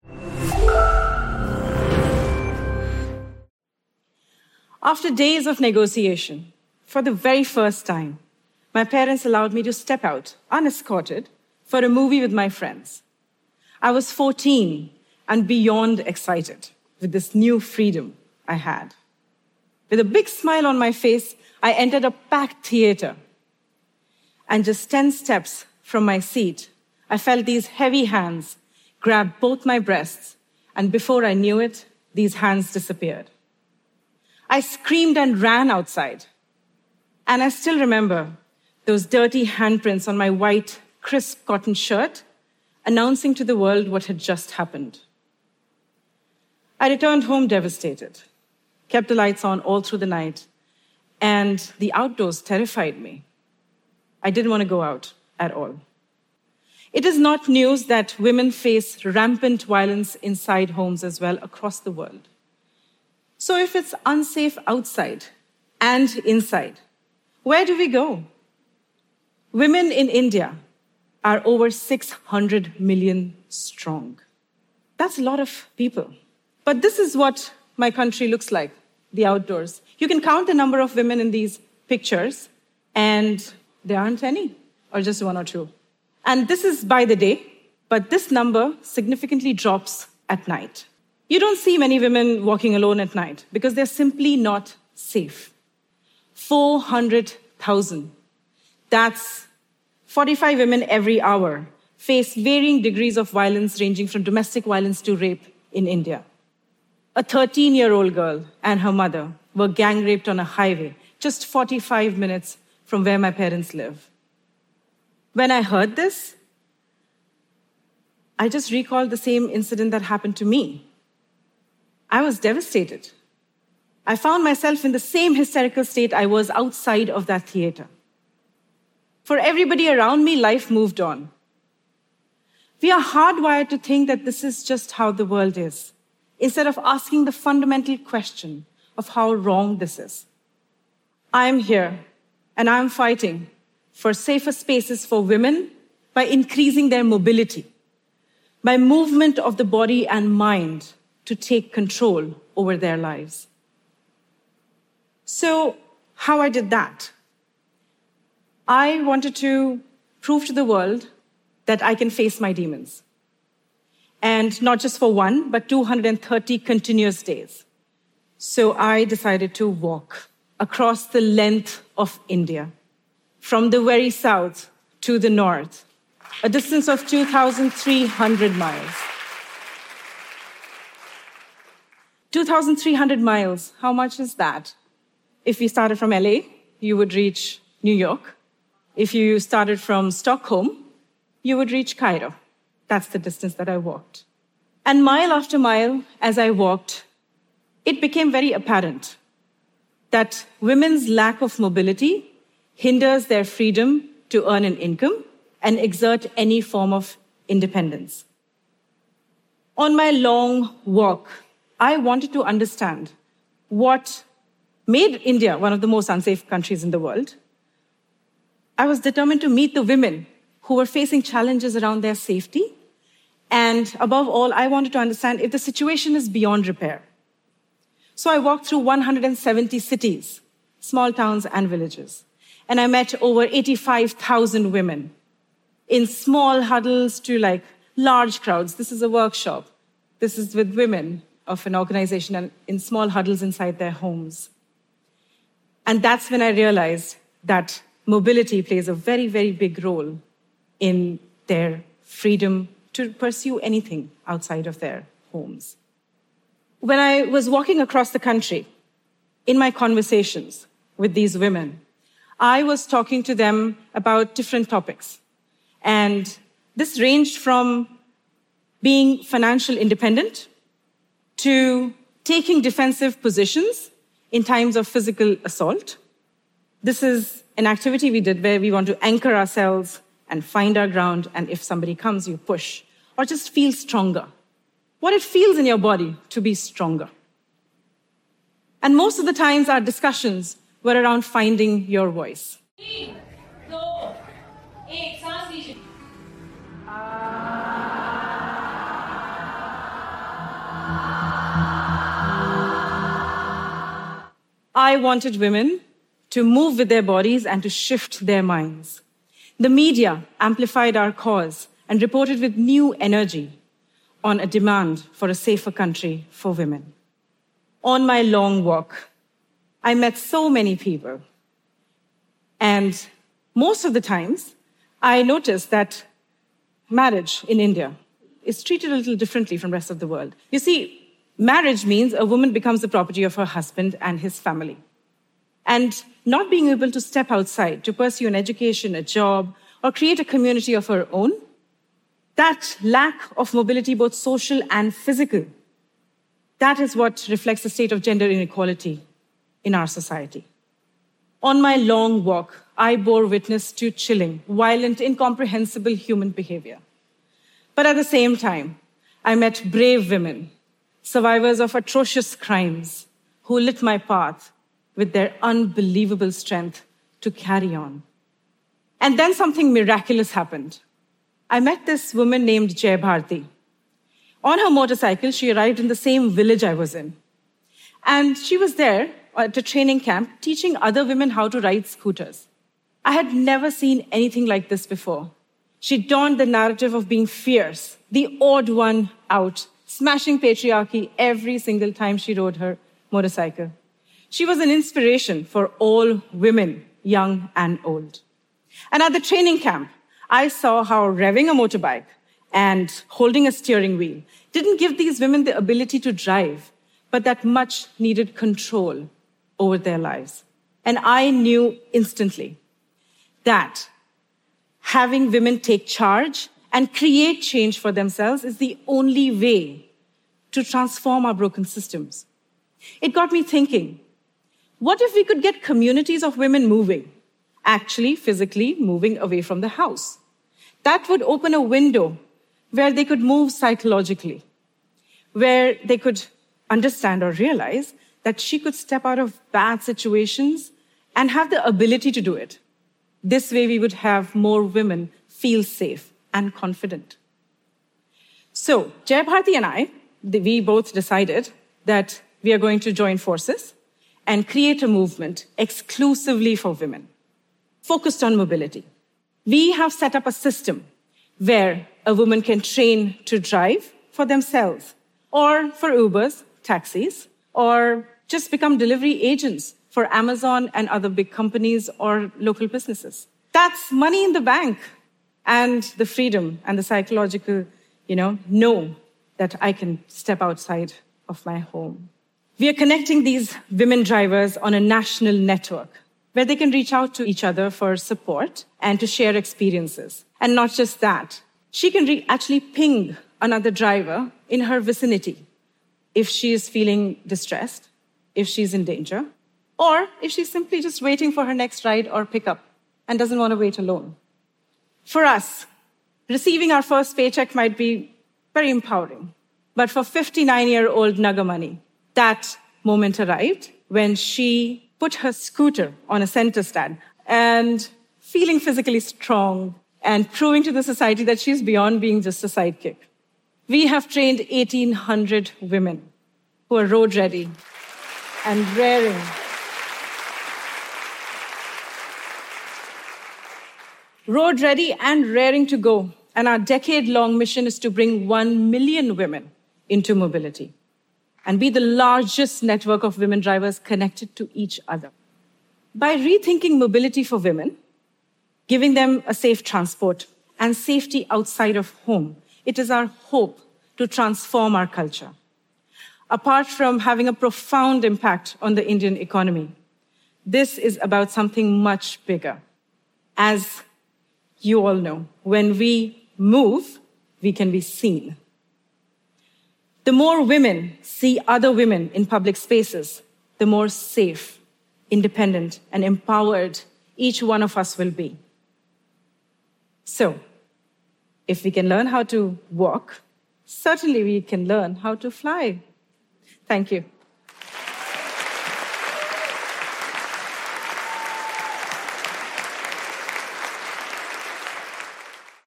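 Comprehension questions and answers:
用 1-2 句话用自己的话回答下面的问题。点「✨ AI 判断」后,AI 会对照当天 transcript 给出参考要点与评分。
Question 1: How old was the speaker when her parents first allowed her to go to a movie with friends without an escort?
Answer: 14

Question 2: According to the speaker, how many women in India face violence every hour, and what is the total annual figure she mentioned?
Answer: 45 women every hour; 400,000 a year

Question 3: What was the distance of the speaker's walk across India, and what two city-to-city comparisons did she give to illustrate it?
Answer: 2,300 miles; like LA to New York and Stockholm to Cairo

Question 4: What specific job opportunities did the speaker and Jai Bharathi create for women through their mobility movement?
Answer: Training women to drive for themselves or for Ubers and taxis, or to work as delivery agents for Amazon, other big companies or local businesses

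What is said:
After days of negotiation, for the very first time,
my parents allowed me to step out unescorted
for a movie with my friends.
I was 14 and beyond excited
with this new freedom I had.
With a big smile on my face, I ended up at the back of the theater.
And just ten steps from my seat,
I felt these heavy hands grab both my breasts.
And before I knew it, these hands disappeared.
I screamed and ran outside.
And I still remember those dirty handprints
on my white, crisp cotton shirt,
announcing to the world what had just happened.
I returned home devastated,
kept the lights on all through the night and the outdoors terrified me.
I didn't want to go out at all.
It is not news that women face rampant violence inside homes as well
across the world.
So if it's unsafe outside and inside, where do we go?
Women in India are over 600 million strong.
That's a lot of people.
But this is what my country looks like.
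The outdoors.
You can count the number of women in these pictures.
And there aren't any, or just one or two.
And this is by the day.
But this number significantly drops at night.
You don't see many women walking alone at night
because they're simply not safe.
400,000, that's 45 women every hour,
face varying degrees of violence,
ranging from domestic violence to rape in India.
A 13-year-old girl and her mother were gang-raped on a highway
just 45 minutes from where my parents live.
When I heard this,
I just recalled the same incident that happened to me.
I was devastated.
I found myself in the same hysterical state
I was outside of that theater.
For everybody around me, life moved on.
We are hardwired to think that this is just how the world is.
Instead of asking the fundamental question
of how wrong this is.
I'm here and I'm fighting for safer spaces for women
by increasing their mobility,
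by movement of the body and mind to take control over their lives.
So how I did that.
I wanted to prove to the world that I can face my demons.
And not just for one, but 230 continuous days.
So I decided to walk across the length of India
from the very south to the north,
a distance of 2,300 miles.
2,300 miles. How much is that?
If you started from LA, you would reach New York.
If you started from Stockholm, you would reach Cairo.
That's the distance that I walked.
And mile after mile, as I walked,
it became very apparent that women's lack of mobility
hinders their freedom to earn an income and exert any form of independence.
On my long walk,
On my long walk, I bore witness
I wanted to understand what made India
one of the most unsafe countries in the world.
I was determined to meet the women
who are facing challenges around their safety.
And above all, I wanted to understand if the situation is beyond repair.
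So I walked through 170 cities, small towns and villages,
and I met over 85,000 women,
in small huddles to, like, large crowds.
This is a workshop.
This is with women of an organization in small huddles inside their homes.
And that's when I realized that mobility plays a very, very big role
in their freedom to pursue anything outside of their homes.
When I was walking across the country,
in my conversations with these women,
I was talking to them about different topics.
And this ranged from being financially independent
to taking defensive positions in times of physical assault.
This is an activity we did where we want to anchor ourselves and find our ground,
and if somebody comes, you push.
Or just feel stronger.
What it feels in your body to be stronger.
And most of the times our discussions were around finding your voice.
I wanted women to move with their bodies and to shift their minds.
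The media amplified our cause
and reported with new energy on a demand for a safer country for women.
On my long walk, I met so many people.
And most of the times, I noticed that marriage in India
is treated a little differently from the rest of the world.
You see, marriage means
a woman becomes the property of her husband and his family.
And not being able to step outside to pursue an education, a job,
or create a community of her own,
that's lack of mobility, both social and physical,
that is what reflects the state of gender inequality in our society.
to chilling, violent, incomprehensible human behavior.
But at the same time, I met brave women, survivors of atrocious crimes
who lit my path with their unbelievable strength to carry on.
And then something miraculous happened.
I met this woman named Jai Bharathi.
On her motorcycle, she arrived in the same village I was in,
and she was there at a training camp, teaching other women how to ride scooters.
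I had never seen anything like this before.
She donned the narrative of being fierce, the odd one out,
smashing patriarchy every single time she rode her motorcycle.
She was an inspiration for all women, young and old.
And at the training camp,
I saw how revving a motorbike and holding a steering wheel
didn't [justt] give these women the ability to drive
but that much needed control over their lives.
And I knew instantly that having women take charge
and create change for themselves
is the only way to transform our broken systems.
It got me thinkingWhat if we could get communities of women moving,
actually physically moving away from the house?
That would open a window where they could move psychologically,
where they could understand or realize that she could step out of bad situations
and have the ability to do it.
This way we would have more women feel safe and confident.
So Jai Bharathi and I, we both decided
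that we are going to join forces and create a movement
exclusively for women,
focused on mobility.
We have set up a system where a woman can train to drive for themselves
or for Ubers, taxis,
or just become delivery agents for Amazon and other big companies
or local businesses.
That's money in the bank.
And the freedom and the psychological, you know --
know that I can step outside of my home.
We are connecting these women drivers on a national network
where they can reach out to each other for support
and to share experiences.
She can actually ping another driver in her vicinity
if she is feeling distressed, if she's in danger,
or if she's simply just waiting for her next ride or pickup
and doesn't want to wait alone.
For us, receiving our first paycheck might be very empowering.
But for 59-year-old Nagamani
that moment arrived when she put her scooter on a center stand
and feeling physically strong,
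and proving to the society that she's beyond being just a sidekick.
We have trained 1,800 women who are road ready.
And raring.
Road ready and raring to go.
And our decade-long mission is to bring one million women into mobility
and be the largest network of women drivers connected to each other.
By rethinking mobility for women,
giving them a safe transport and safety outside of home,
it is our hope to transform our culture.
Apart from having a profound impact on the Indian economy,
this is about something much bigger.
As you all know, when we move, we can be seen.
The more women see other women in public spaces,
the more safe, independent and empowered each one of us will be.
So.
If we can learn how to walk, certainly we can learn how to fly.
Thank you.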